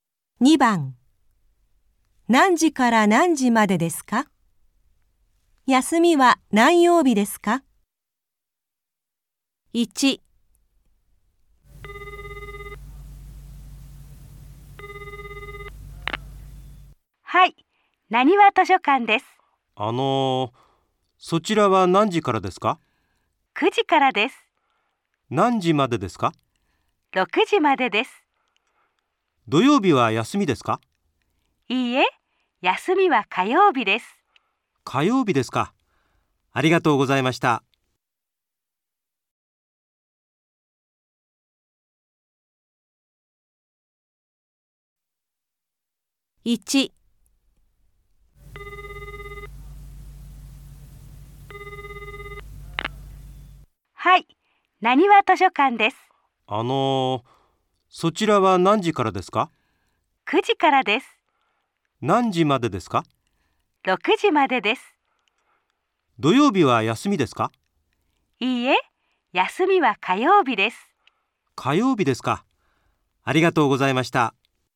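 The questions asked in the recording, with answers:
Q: 何時から何時までですか?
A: 9時から6時まで

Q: 休みは何曜日ですか?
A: 火曜日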